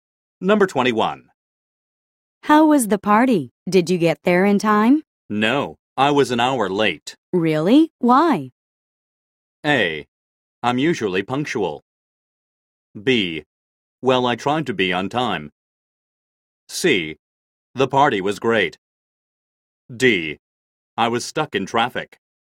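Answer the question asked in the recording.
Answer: D: I was stuck in traffic.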